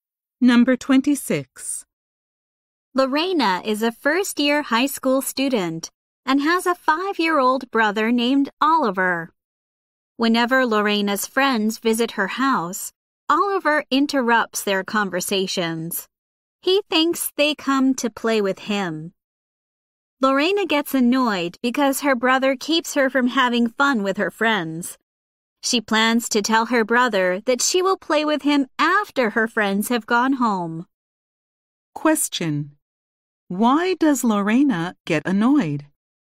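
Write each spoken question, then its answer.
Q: Why does Lorena get annoyed?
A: Her brother interrupts her time with her friends.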